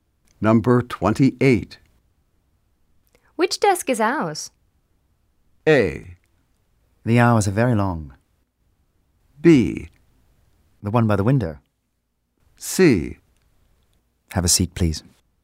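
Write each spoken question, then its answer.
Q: Which desk is ours?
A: B: The one by the window.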